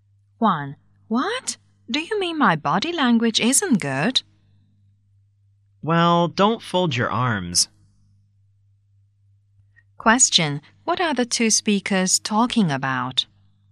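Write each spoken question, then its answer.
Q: What are the two speakers talking about?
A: The woman's body language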